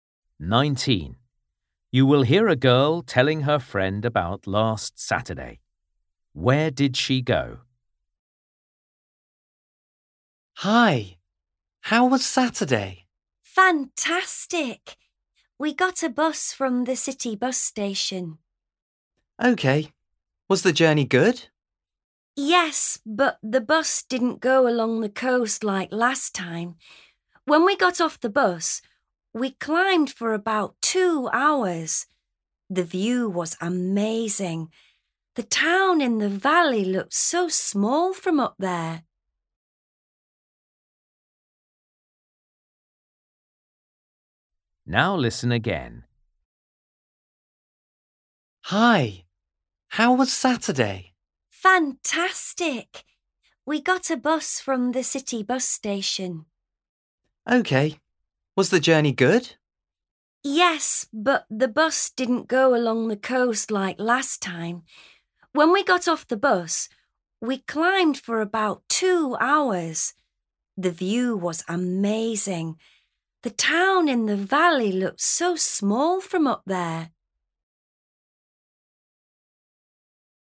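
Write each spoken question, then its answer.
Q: Where did she go?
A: Up a mountain / hill above a town in a valley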